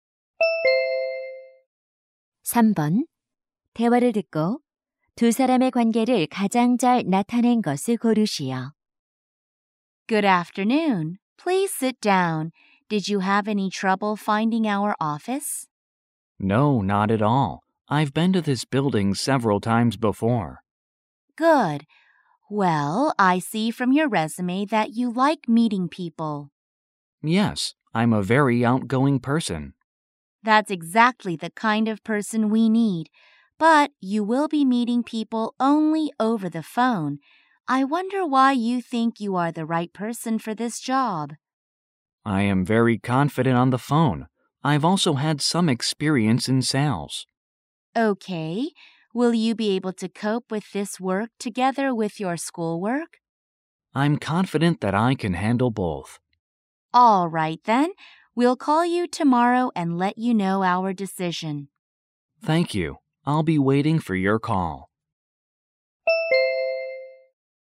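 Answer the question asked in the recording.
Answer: 면접관과 구직자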